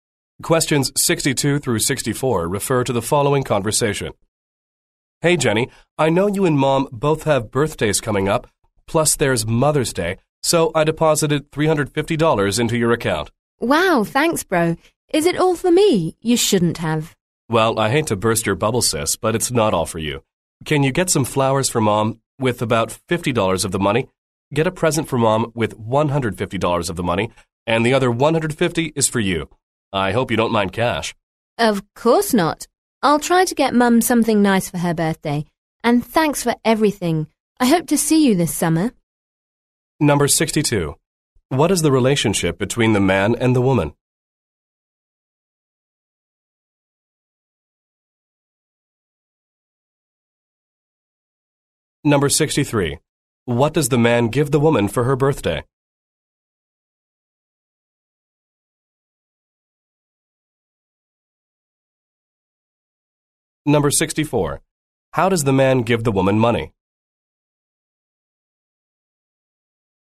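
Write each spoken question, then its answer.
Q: What is the relationship between the man and the woman?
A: Brother and sister

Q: What does the man give the woman for her birthday?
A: $150 in cash

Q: How does the man give the woman money?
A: He deposited it into her account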